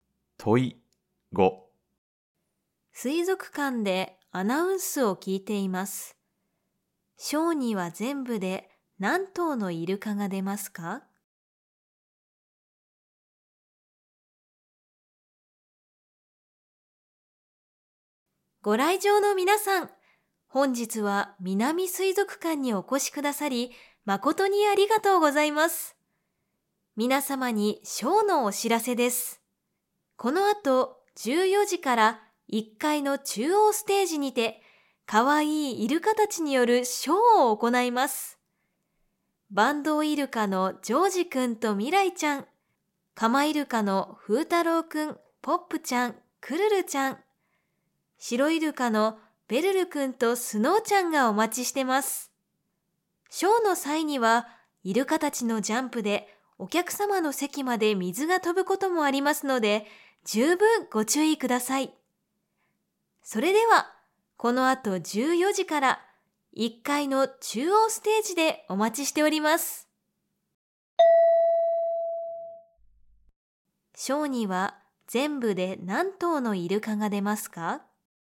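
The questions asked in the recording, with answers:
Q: ショーには全部で何頭のイルカが出ますか?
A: 7頭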